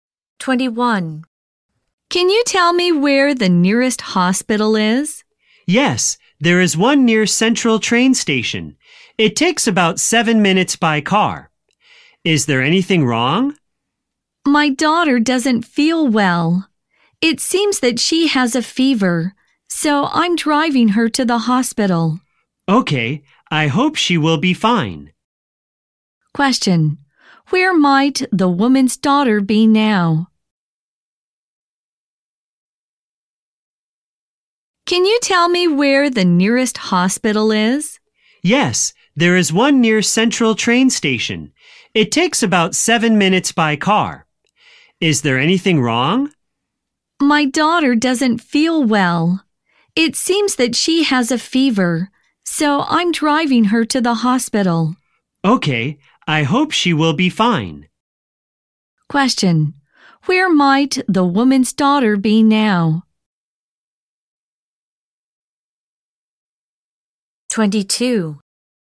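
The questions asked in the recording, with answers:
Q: Question, where might the woman's daughter be now?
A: In the car, on the way to the hospital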